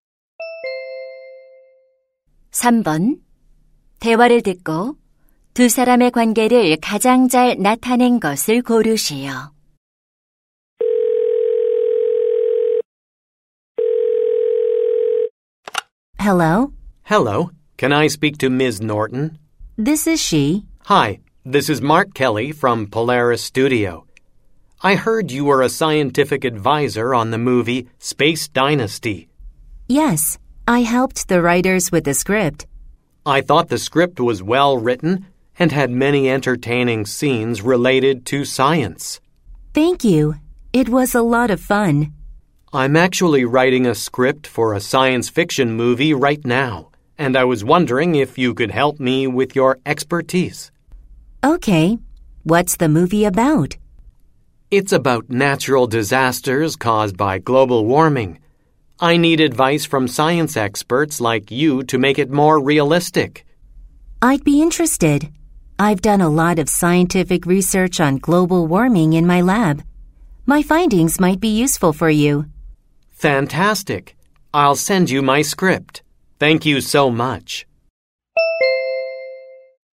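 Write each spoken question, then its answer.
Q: 대화를 듣고 두 사람의 관계를 가장 잘 나타낸 것을 고르시오.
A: 영화 각본가 — 과학 자문가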